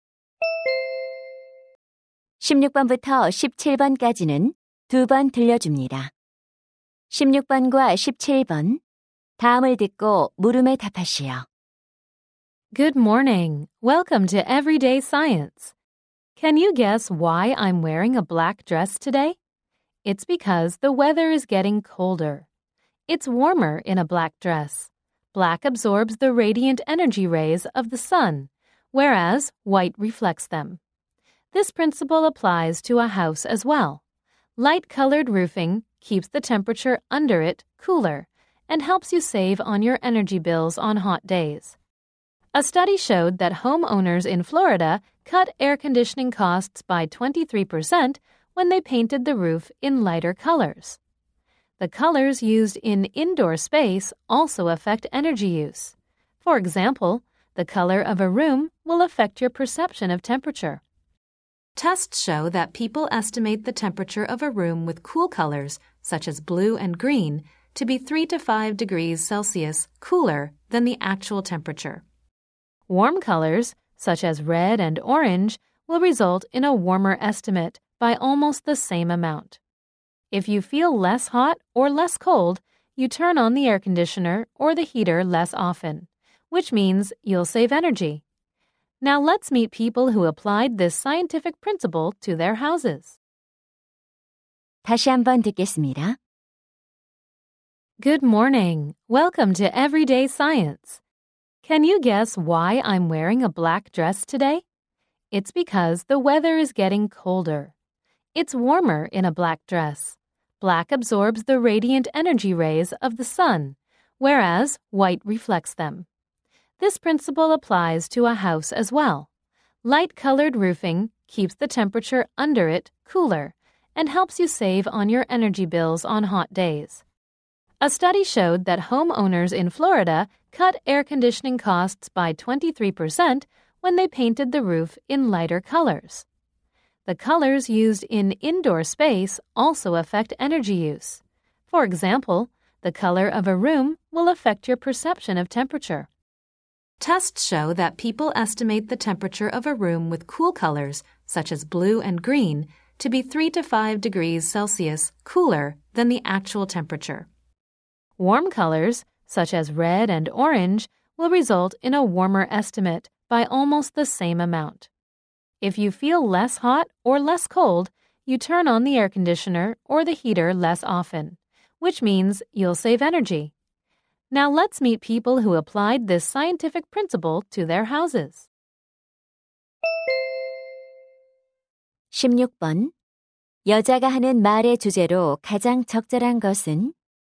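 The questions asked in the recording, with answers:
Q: 여자가 하는 말의 주제로 가장 적절한 것은?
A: 색상이 온도 및 에너지 사용에 미치는 영향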